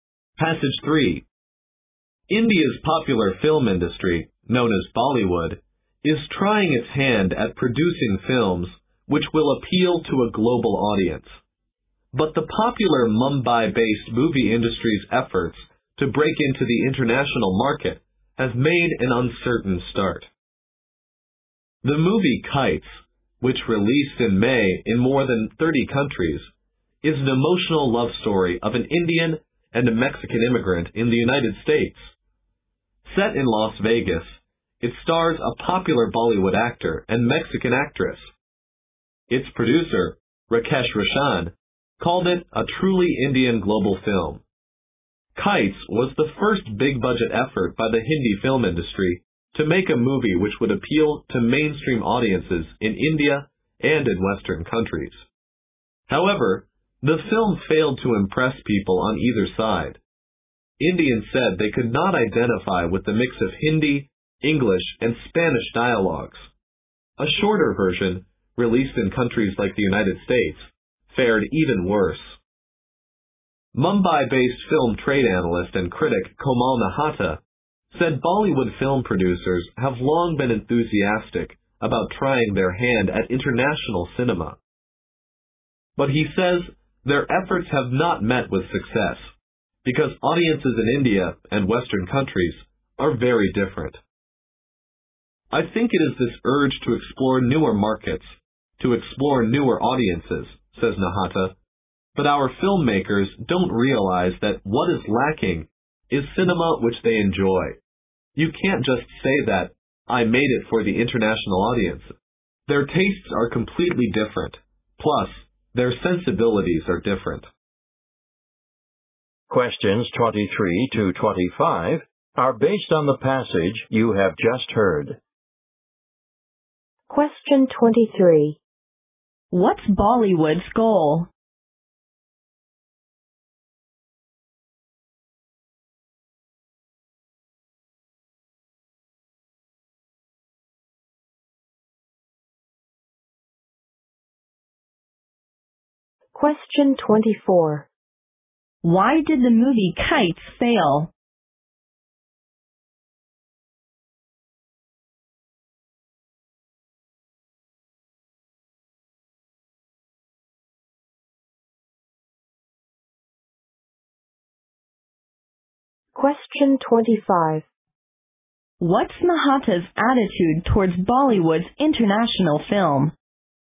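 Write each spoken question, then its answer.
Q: What's Bollywood's goal?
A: To make films that appeal to a global audience

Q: Why did the movie Kites fail?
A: It failed to impress audiences in India and the West; Indians couldn't identify with the mix of Hindi, English and Spanish dialogue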